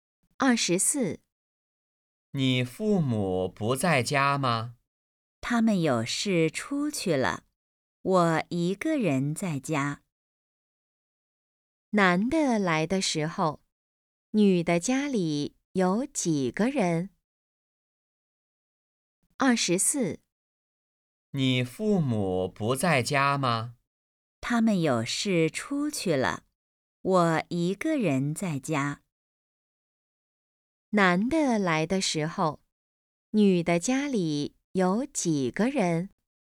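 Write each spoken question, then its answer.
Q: 男的来的时候,女的家里有几个人?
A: 一个人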